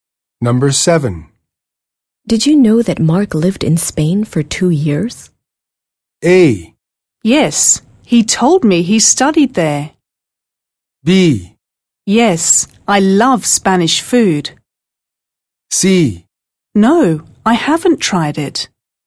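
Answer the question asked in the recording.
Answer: A: Yes, he told me he studied there.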